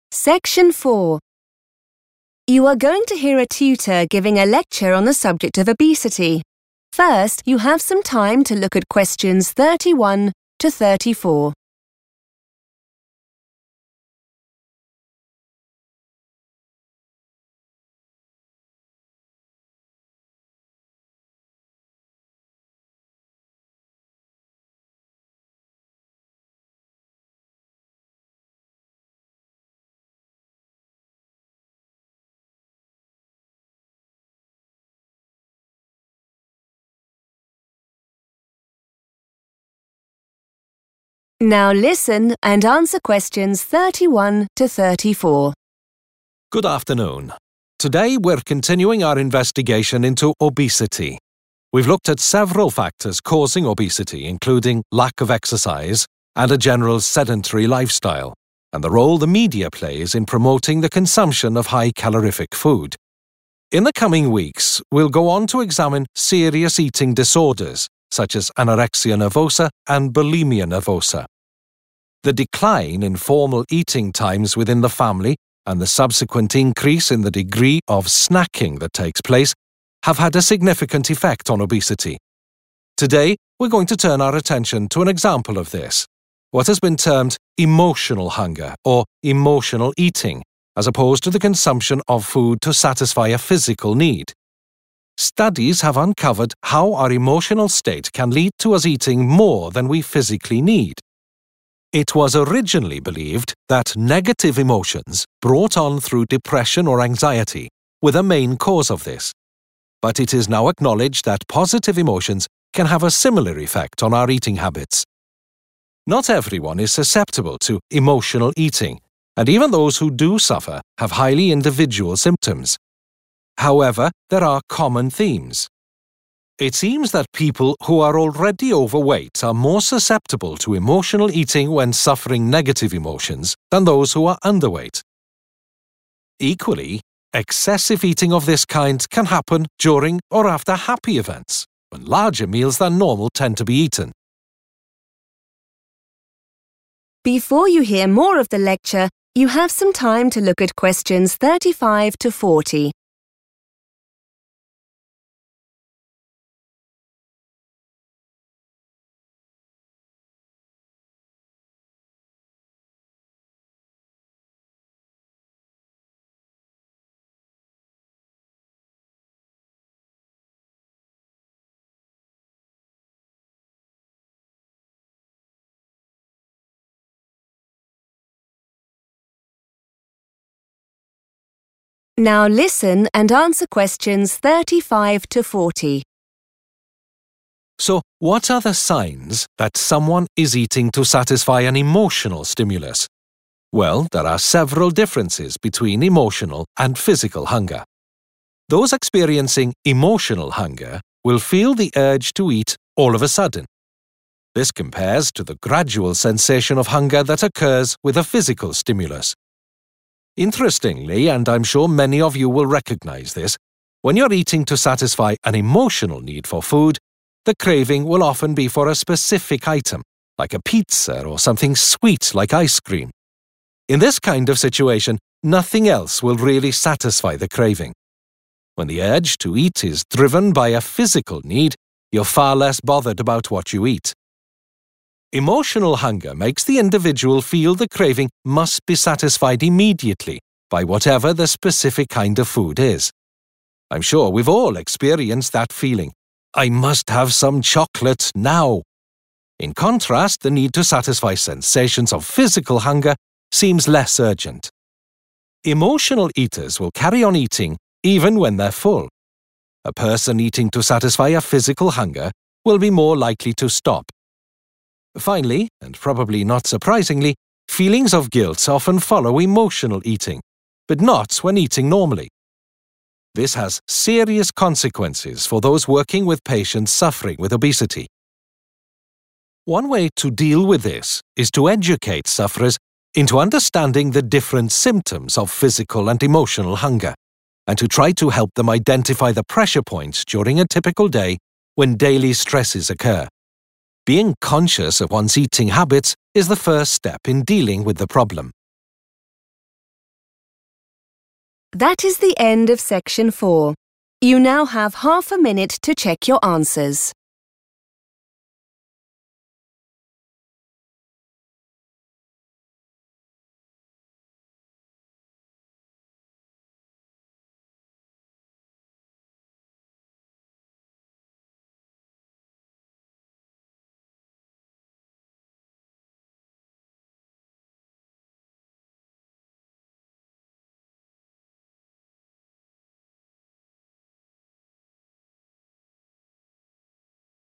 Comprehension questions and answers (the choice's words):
Complete the sentences below. Write NO MORE THAN THREE WORDS for each answer.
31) times are less common within the family.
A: formal eating

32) We may eat more than we need due to our _____ .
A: emotional state

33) Eating habits can be affected by both _____ emotions.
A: positive and negative

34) People who are _____ are more likely to eat more due to negative emotions.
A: already overweight / overweight

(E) emotional hunger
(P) physical hunger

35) Experiences a sudden urge to eat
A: emotional hunger

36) Hungers for any type of food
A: physical hunger

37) Needs to satisfy the hunger as soon as possible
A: emotional hunger

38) Will stop eating once full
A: physical hunger

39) Will feel no sense of guilt after eating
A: physical hunger

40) People suffering from obesity can be helped by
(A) taking the pressure off them about feeling guilty.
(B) understanding why they have negative feelings.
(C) pinpointing stressful moments that can cause emotional hunger.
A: pinpointing stressful moments that can cause emotional hunger.

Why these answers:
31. The correct answer is derived from the speaker's observation about how family habits have changed. The transcript uses the word "decline," which means to become less or decrease, when talking about "formal eating times." This matches the phrase "less common" used in the question.
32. The correct answer is "emotional state" because the transcript mentions that researchers have found that how we feel can cause us to consume more food than our bodies actually require for energy. This happens because our feelings or mood can trigger a desire to eat even when we are not physically hungry.
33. The correct answer is 'positive and negative' because the speaker explains that both types of 'emotions' have an 'effect' on 'eating habits'. While researchers originally focused on 'negative emotions' like sadness or worry, it is 'now acknowledged' that 'positive emotions' (happiness) can also cause people to eat more than they physically need.
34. The correct answer is confirmed by the transcript's discussion on who is most affected by emotional eating. It explains that individuals who are already weighing too much are more likely (or "susceptible") to eat in response to bad feelings, such as sadness or stress, compared to people who are underweight. This matches the sentence structure which asks who eats more due to "negative emotions."
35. The correct answer is E because the speaker mentions that emotional hunger starts very quickly. The phrase 'all of a sudden' is used to describe how the urge to eat feels for someone experiencing emotional hunger. In contrast, physical hunger is described as a 'gradual' feeling, which means it happens slowly over time.
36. The correct answer is P because the transcript explains that there is a difference in how we choose food based on why we are hungry. Emotional hunger makes a person want one specific thing, like pizza or sweets. However, when the hunger comes from a physical need, the person is not picky and is far less concerned with what they eat, meaning they will eat any type of food available.
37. The correct answer is emotional hunger because the speaker explains that this feeling comes on suddenly and needs to be satisfied 'immediately'. In contrast, physical hunger is described as 'less urgent', meaning it builds up slowly and does not require an instant response to eat.
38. The correct answer is 'P' because the speaker explains that physical hunger leads people to stop eating when they have had enough. Emotional hunger is different because people might keep eating even if they feel full.
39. The correct answer is physical hunger because the text contrasts it with emotional eating. It explains that while people often feel bad about themselves (guilt) after eating for emotional reasons, they do not feel this way when they eat 'normally,' which refers to eating for physical needs. Keywords like 'guilt' and 'normally' help distinguish between common reactions to these two types of hunger.
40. The correct answer is derived from the final part of the transcript, which discusses solutions for patients with obesity. It explains that a key method of help is to 'identify' (which means the same as pinpointing) the 'pressure points' or 'daily stresses' that happen during their day. These stressful moments are the triggers for emotional hunger.

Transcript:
Good afternoon. Today we're continuing our investigation into obesity. We've looked at several factors causing obesity including lack of exercise and a general sedentary lifestyle and the role the media plays in promoting the consumption of high-calorific food. In the coming weeks we'll go on to examine serious eating disorders such as anorexia nervosa and bulimia nervosa.
The decline in formal eating times within the family and the subsequent increase in the degree of 'snacking' that takes place have had a significant effect on obesity. Today we're going to turn our attention to an example of this, what has been termed 'emotional hunger' or 'emotional eating', as opposed to the consumption of food to satisfy a physical need. Studies have uncovered how our emotional state can lead to us eating more than we physically need. It was originally believed that negative emotions brought on through depression or anxiety were the main cause of this. But it is now acknowledged that positive emotions can have a similar effect on our eating habits.
Not everyone is susceptible to emotional eating, and even those who do suffer have highly individual symptoms. However, there are common themes. It seems that people who are already overweight are more susceptible to emotional eating when suffering negative emotions than those who are underweight. Equally, excessive eating of this kind can happen during or after happy events, when larger meals than normal tend to be eaten.
So what are the signs that someone is eating to satisfy an emotional stimulus? Well, there are several differences between emotional and physical hunger.
Those experiencing emotional hunger will feel the urge to eat all of a sudden. This compares to the gradual sensation of hunger that occurs with a physical stimulus.
Interestingly, and I'm sure many of you will recognise this, when you're eating to satisfy an emotional need for food, the craving will often be for a specific item like a pizza or something sweet like ice cream. In this kind of situation, nothing else will really satisfy the craving. When the urge to eat is driven by a physical need, you're far less bothered about what you eat.
Emotional hunger makes the individual feel the craving must be satisfied immediately by whatever the specific kind of food is. I'm sure we've all experienced that feeling: 'I must have some chocolate ... now!' In contrast, the need to satisfy sensations of physical hunger seems less urgent.
Emotional eaters will carry on eating even when they're full. A person eating to satisfy a physical hunger will be more likely to stop.
Finally and probably not surprisingly, feelings of guilt often follow emotional eating but not when eating normally.
This has serious consequences for those working with patients suffering with obesity. One way to deal with this is to educate sufferers into understanding the different symptoms of physical and emotional hunger and to try to help them identify the pressure points during a typical day when daily stresses occur. Being conscious of one's eating habits is the first step in dealing with the problem.